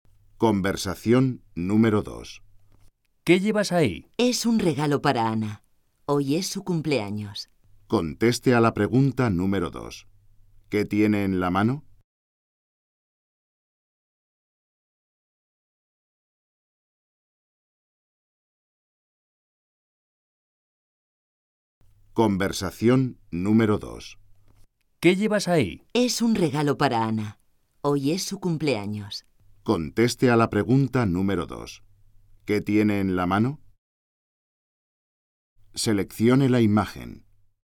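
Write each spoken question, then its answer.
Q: ¿Qué tiene en la mano?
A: Un regalo para Ana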